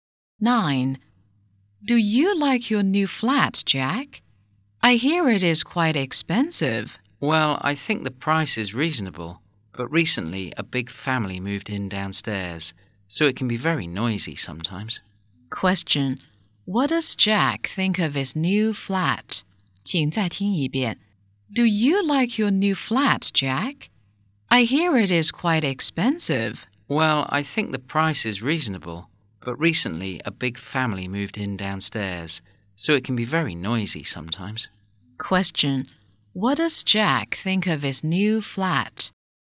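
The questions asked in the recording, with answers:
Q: What does Jack think of his new flat?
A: The price is reasonable but it can be noisy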